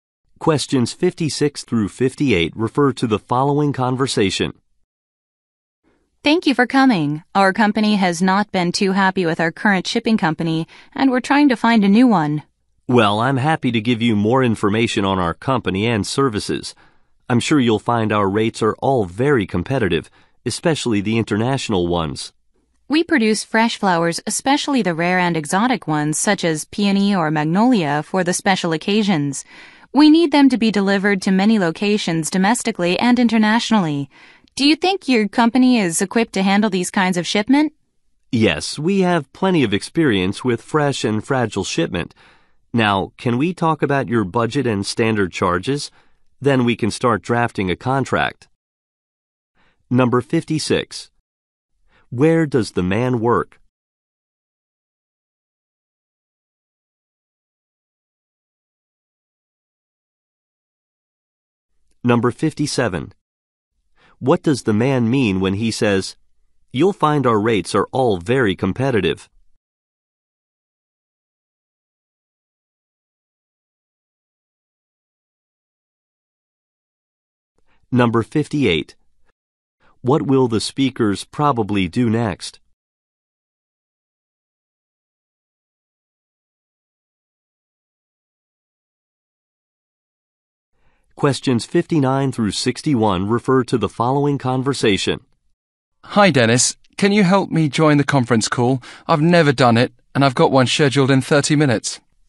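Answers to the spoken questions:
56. At a shipping company
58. Discuss the budget and charges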